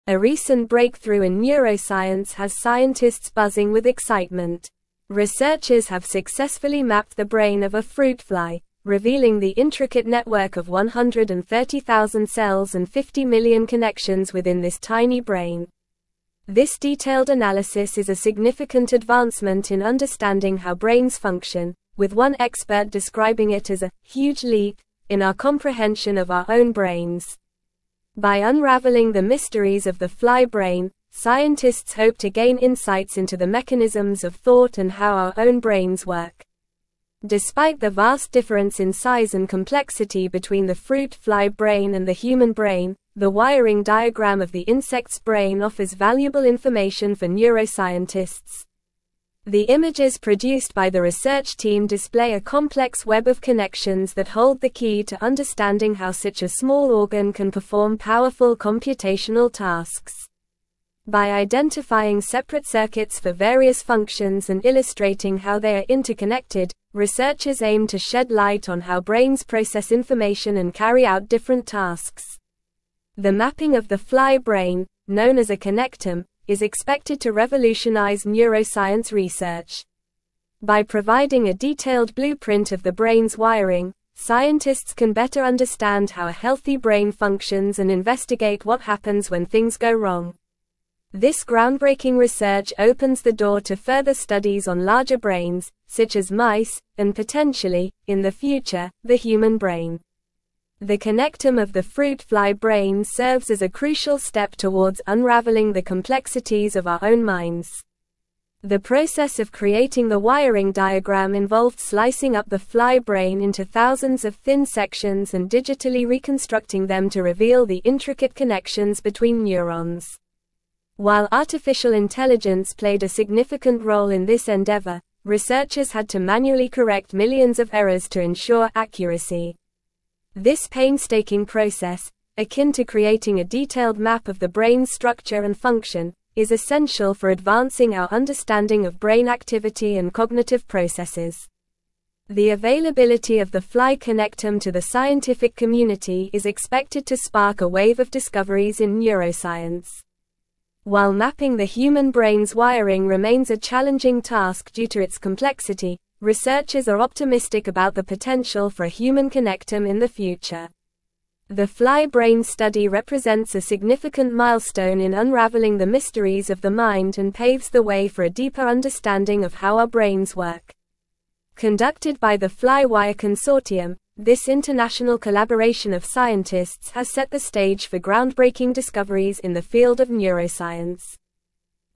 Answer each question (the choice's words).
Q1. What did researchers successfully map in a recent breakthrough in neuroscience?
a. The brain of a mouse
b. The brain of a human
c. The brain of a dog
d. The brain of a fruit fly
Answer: The brain of a fruit fly

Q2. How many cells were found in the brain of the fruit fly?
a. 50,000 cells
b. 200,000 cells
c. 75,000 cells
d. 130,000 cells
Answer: 130,000 cells

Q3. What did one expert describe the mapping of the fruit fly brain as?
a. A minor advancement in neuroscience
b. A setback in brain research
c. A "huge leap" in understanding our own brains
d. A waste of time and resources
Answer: A "huge leap" in understanding our own brains

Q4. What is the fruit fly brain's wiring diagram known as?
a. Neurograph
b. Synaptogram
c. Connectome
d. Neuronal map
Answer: Connectome

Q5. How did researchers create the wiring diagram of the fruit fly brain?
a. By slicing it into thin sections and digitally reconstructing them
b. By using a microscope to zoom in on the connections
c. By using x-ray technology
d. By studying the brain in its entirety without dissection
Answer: By slicing it into thin sections and digitally reconstructing them

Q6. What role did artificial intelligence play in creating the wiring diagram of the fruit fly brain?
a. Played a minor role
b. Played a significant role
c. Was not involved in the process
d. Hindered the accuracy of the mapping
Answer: Played a significant role

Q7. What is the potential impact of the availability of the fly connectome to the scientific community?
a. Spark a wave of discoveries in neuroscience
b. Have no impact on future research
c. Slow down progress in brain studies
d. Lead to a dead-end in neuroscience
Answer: Spark a wave of discoveries in neuroscience

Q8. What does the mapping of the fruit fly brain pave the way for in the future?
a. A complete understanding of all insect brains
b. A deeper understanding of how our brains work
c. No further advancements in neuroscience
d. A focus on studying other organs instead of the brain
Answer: A deeper understanding of how our brains work

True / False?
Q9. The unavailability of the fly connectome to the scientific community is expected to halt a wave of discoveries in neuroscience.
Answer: False

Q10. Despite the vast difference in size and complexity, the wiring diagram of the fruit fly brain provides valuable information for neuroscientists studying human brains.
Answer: True

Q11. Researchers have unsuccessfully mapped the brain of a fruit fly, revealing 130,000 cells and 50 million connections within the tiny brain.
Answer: False

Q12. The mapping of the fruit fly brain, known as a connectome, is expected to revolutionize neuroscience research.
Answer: True

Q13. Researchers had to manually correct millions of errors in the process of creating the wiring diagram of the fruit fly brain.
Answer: True

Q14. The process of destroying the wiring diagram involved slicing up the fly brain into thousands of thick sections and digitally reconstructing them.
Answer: False

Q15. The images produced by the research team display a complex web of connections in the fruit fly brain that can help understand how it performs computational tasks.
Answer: True

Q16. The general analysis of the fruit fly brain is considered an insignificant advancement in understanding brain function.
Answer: False

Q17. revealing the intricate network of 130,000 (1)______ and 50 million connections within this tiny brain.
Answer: cells

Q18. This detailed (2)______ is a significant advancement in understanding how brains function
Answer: analysis

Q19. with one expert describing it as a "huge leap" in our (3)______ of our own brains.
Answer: comprehension

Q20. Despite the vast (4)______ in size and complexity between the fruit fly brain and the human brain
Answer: difference

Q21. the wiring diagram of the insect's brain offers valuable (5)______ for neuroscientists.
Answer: information

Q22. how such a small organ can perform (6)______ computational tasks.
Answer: powerful

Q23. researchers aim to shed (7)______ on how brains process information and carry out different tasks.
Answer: light

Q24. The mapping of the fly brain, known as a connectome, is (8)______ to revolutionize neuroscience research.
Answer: expected

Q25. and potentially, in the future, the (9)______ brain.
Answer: human

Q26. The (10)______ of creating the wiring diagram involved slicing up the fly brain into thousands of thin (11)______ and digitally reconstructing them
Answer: process

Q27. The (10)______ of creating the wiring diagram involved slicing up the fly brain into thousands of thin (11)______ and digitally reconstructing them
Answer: sections

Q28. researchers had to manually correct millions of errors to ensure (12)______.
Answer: accuracy

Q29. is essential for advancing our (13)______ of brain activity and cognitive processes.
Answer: understanding

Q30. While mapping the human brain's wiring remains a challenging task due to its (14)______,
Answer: complexity

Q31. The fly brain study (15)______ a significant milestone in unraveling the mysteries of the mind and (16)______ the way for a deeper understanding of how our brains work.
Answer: represents

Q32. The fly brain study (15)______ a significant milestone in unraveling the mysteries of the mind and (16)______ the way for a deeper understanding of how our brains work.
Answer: paves

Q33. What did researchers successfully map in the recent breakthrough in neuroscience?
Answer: Researchers successfully mapped the brain of a fruit fly.

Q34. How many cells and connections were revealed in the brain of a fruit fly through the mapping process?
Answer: The mapping process revealed 130,000 cells and 50 million connections within the fruit fly brain.

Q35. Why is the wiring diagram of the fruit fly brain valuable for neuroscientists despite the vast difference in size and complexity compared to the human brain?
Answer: The wiring diagram of the fruit fly brain offers valuable information for neuroscientists by providing insights into the mechanisms of thought and how brains function.

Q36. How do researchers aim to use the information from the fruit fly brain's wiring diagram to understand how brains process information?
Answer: Researchers aim to use the information to identify separate circuits for various functions and illustrate how they are interconnected, shedding light on how brains process information and carry out different tasks.

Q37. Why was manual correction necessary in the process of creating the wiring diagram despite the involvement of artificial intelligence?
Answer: Manual correction was necessary to ensure accuracy as researchers had to correct millions of errors in the digital reconstruction of the brain sections.

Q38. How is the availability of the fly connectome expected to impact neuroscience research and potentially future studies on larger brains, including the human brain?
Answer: The availability of the fly connectome is expected to spark discoveries in neuroscience and pave the way for future studies on larger brains, potentially leading to a human connectome in the future.

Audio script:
A recent breakthrough in neuroscience has scientists buzzing with excitement. Researchers have successfully mapped the brain of a fruit fly, revealing the intricate network of 130,000 cells and 50 million connections within this tiny brain. This detailed analysis is a significant advancement in understanding how brains function, with one expert describing it as a "huge leap" in our comprehension of our own brains. By unraveling the mysteries of the fly brain, scientists hope to gain insights into the mechanisms of thought and how our own brains work.
Despite the vast difference in size and complexity between the fruit fly brain and the human brain, the wiring diagram of the insect's brain offers valuable information for neuroscientists. The images produced by the research team display a complex web of connections that hold the key to understanding how such a small organ can perform powerful computational tasks. By identifying separate circuits for various functions and illustrating how they are interconnected, researchers aim to shed light on how brains process information and carry out different tasks.
The mapping of the fly brain, known as a connectome, is expected to revolutionize neuroscience research. By providing a detailed blueprint of the brain's wiring, scientists can better understand how a healthy brain functions and investigate what happens when things go wrong. This groundbreaking research opens the door to further studies on larger brains, such as mice, and potentially, in the future, the human brain. The connectome of the fruit fly brain serves as a crucial step towards unraveling the complexities of our own minds.
The process of creating the wiring diagram involved slicing up the fly brain into thousands of thin sections and digitally reconstructing them to reveal the intricate connections between neurons. While artificial intelligence played a significant role in this endeavor, researchers had to manually correct millions of errors to ensure accuracy. This painstaking process, akin to creating a detailed map of the brain's structure and function, is essential for advancing our understanding of brain activity and cognitive processes.
The availability of the fly connectome to the scientific community is expected to spark a wave of discoveries in neuroscience. While mapping the human brain's wiring remains a challenging task due to its complexity, researchers are optimistic about the potential for a human connectome in the future. The fly brain study represents a significant milestone in unraveling the mysteries of the mind and paves the way for a deeper understanding of how our brains work. Conducted by the FlyWire Consortium, this international collaboration of scientists has set the stage for groundbreaking discoveries in the field of neuroscience.

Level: Level 4